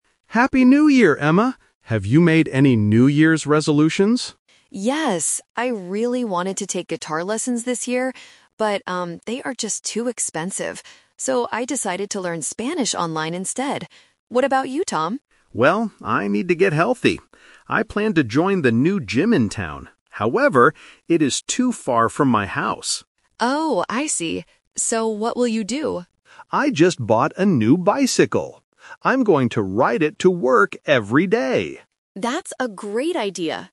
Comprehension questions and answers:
Listen to the conversation between a brother and sister and choose the correct answer (A, B, or C) for each question.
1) What is Emma's New Year's resolution?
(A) To take guitar lessons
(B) To learn Spanish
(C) To learn how to paint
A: (B) To learn Spanish

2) What is Tom going to do to get healthy?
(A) Join a gym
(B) Walk to work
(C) Ride a bicycle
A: (C) Ride a bicycle

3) Why didn't Tom join the gym?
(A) It is too expensive.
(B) It is too far away.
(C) He doesn't have time.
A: (B) It is too far away.

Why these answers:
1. Emma says she wanted to take guitar lessons (The Trap), but she changed her mind because they are too expensive. She uses "So" to introduce her final decision, which is to learn Spanish online. Painting is not mentioned.
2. Tom says he planned to join a gym (The Trap). However, he uses the word "However" to change his plan. His final action is buying a bicycle to ride to work. Walking to work is not mentioned.
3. Tom specifically says the gym is "too far from my house." Option A (too expensive) is a trap because that was Emma's reason for not taking guitar lessons, not Tom's reason.

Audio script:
Tom: Happy New Year, Emma! Have you made any New Year's resolutions?
Emma: Yes! I really wanted to take guitar lessons this year. But, um, they are just too expensive. So, I decided to learn Spanish online instead. What about you, Tom?
Tom: Well, I need to get healthy. I planned to join the new gym in town. However, it is too far from my house.
Emma: Oh, I see. So, what will you do?

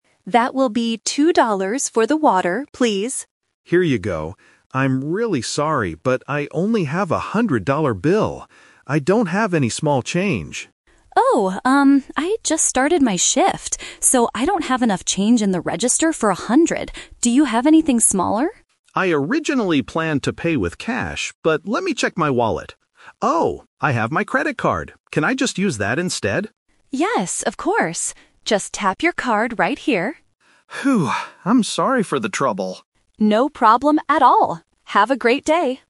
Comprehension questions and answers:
Listen to the conversation and choose the correct answer (A, B, or C).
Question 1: Why does the customer apologize first?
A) He doesn't have any money to pay.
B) He only has a very large bill.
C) He took the wrong bottle of water.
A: B) He only has a very large bill.

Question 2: Why can't the cashier accept the cash?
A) The shop does not accept cash today.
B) She doesn't have enough small bills to give back.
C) The customer's bill is fake.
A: B) She doesn't have enough small bills to give back.

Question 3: How does the customer pay in the end?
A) With a hundred-dollar bill.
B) With small coins.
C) With a credit card.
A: C) With a credit card.

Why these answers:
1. The customer says, "I'm really sorry, but I only have a hundred-dollar bill. I don't have any small change." Trap: Option (A) is a trap. He has money, but it is too big. Option (C) is a plausible shop problem, but it is not mentioned in the audio.
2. The cashier explains, "I don't have enough change in the register for a hundred." Trap: Option (A) is incorrect because the shop does accept cash; the problem is just the lack of change since she "just started her shift".
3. The customer asks, "Can I just use that (credit card) instead?" and the cashier says, "Yes, of course." Trap: Option (A) is the "Twist" trap. He planned and tried to pay with the hundred-dollar bill, but he had to change his plan.

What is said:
Customer: Here you go. I'm really sorry, but I only have a hundred-dollar bill. I don't have any small change.
I just started my shift, so I don't have enough change in the register for a hundred. Do you have anything smaller?
Customer: I originally planned to pay with cash, but let me check my wallet. Oh! I have my credit card. Can I just use that instead?
Cashier: Yes, of course. Just tap your card right here.
Customer: Phew. I'm sorry for the trouble.
Cashier: No problem at all. Have a great day!

